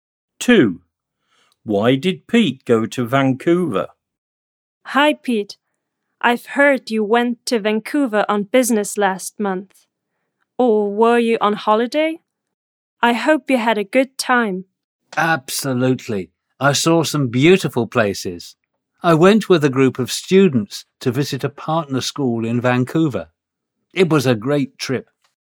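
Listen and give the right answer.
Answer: To visit a partner school with a group of students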